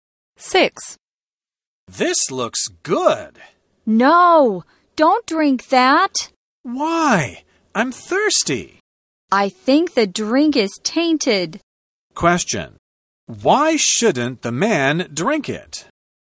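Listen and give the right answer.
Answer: The drink is tainted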